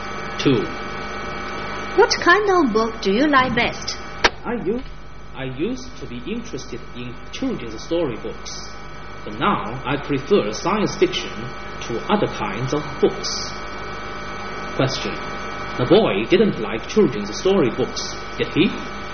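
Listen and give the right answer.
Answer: Yes, he did (he used to)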